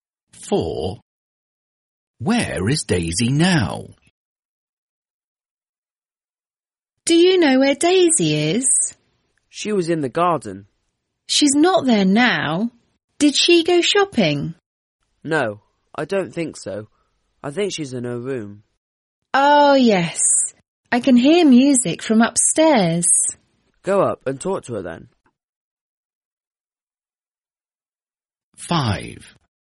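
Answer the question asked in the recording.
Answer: in her room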